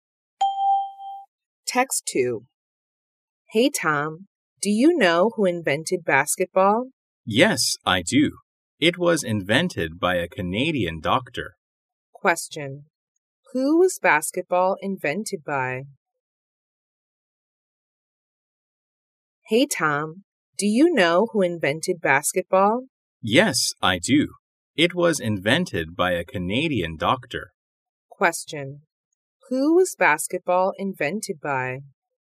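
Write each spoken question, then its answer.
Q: Who was basketball invented by?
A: A Canadian doctor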